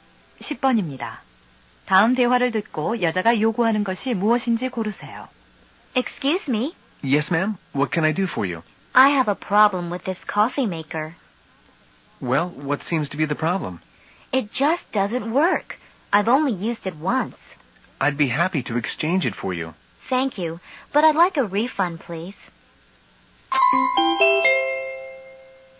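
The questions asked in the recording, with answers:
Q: 다음 대화를 듣고 여자가 요구하는 것이 무엇인지 고르세요.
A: 환불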